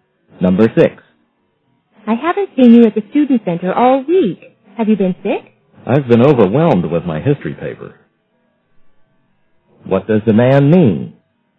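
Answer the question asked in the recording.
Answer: He has been very busy with his history paper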